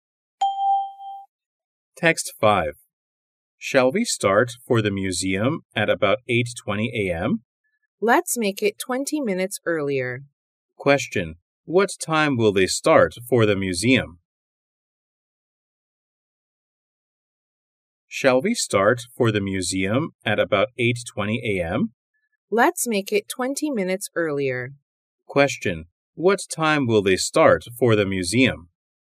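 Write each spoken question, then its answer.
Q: What time will they start for the museum?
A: At 8:00 a.m.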